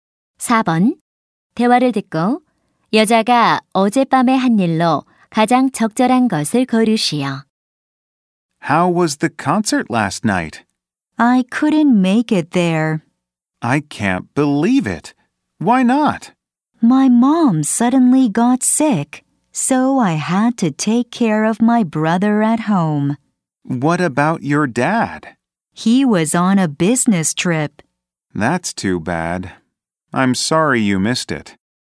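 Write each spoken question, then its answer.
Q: 대화를 듣고 여자가 어젯밤에 한 일로 가장 적절한 것을 고르시오.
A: 집에서 남동생 돌보기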